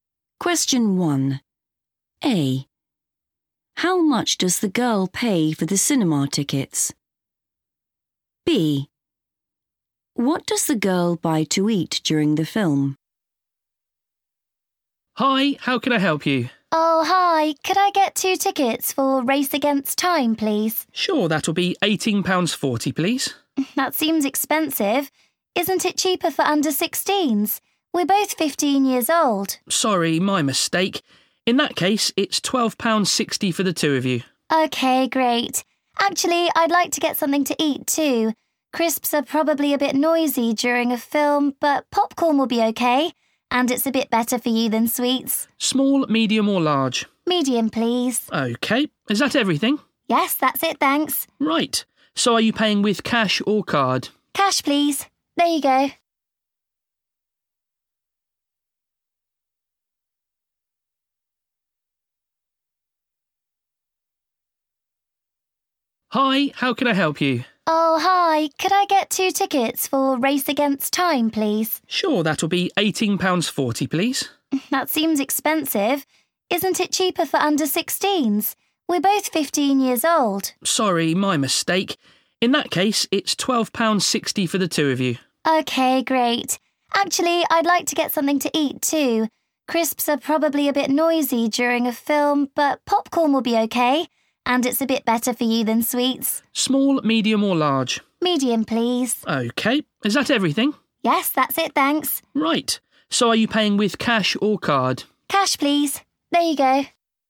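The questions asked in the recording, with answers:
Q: How much does the girl pay for the cinema tickets?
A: £12.60

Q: What does the girl buy to eat during the film?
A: popcorn (medium)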